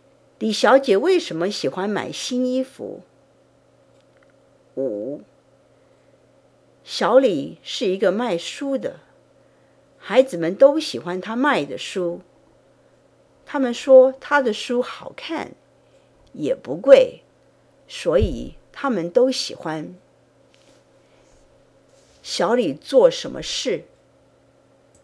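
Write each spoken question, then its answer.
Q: 小李做什么事?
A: 他是卖书的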